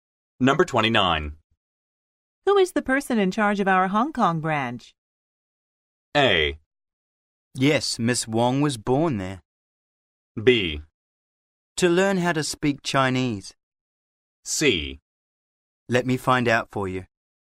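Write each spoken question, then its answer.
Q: Who is the person in charge of our Hong Kong branch?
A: C: Let me find out for you.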